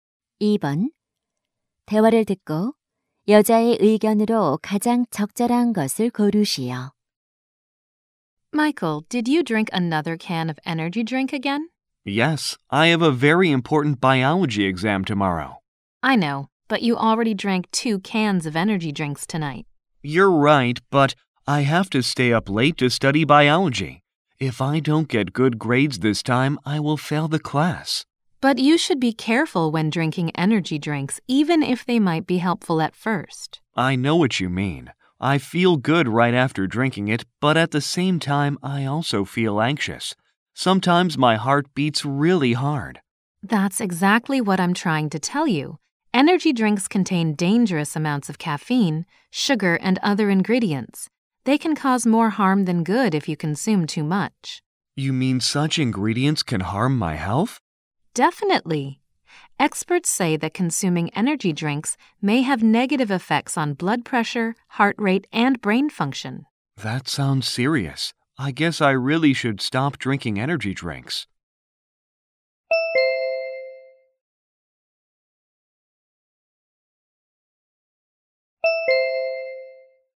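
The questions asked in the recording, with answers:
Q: 대화를 듣고 여자의 의견으로 가장 적절한 것을 고르시오.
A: 에너지 음료를 과다 섭취하면 건강에 해롭다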